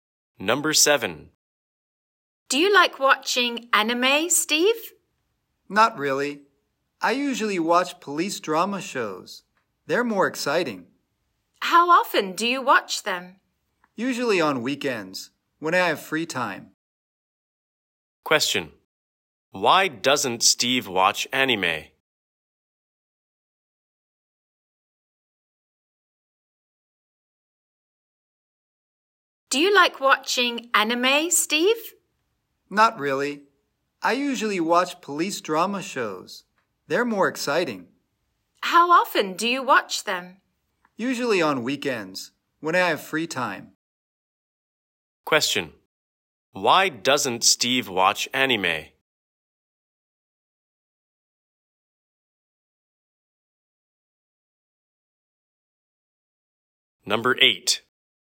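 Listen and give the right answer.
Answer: He thinks police drama shows are more exciting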